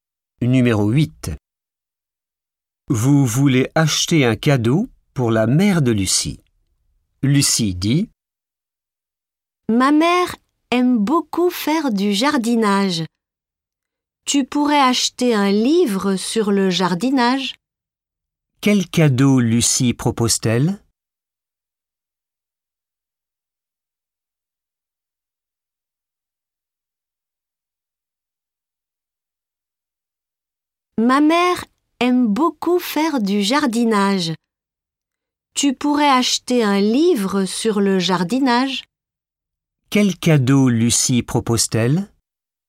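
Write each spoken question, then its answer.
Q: Quel cadeau Lucie propose-t-elle?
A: Un livre sur le jardinage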